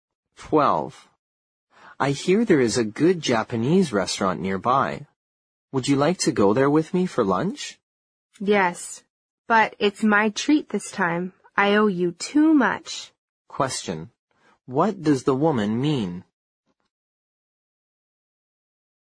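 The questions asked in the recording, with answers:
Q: What does the woman mean?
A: She wants to pay for lunch this time.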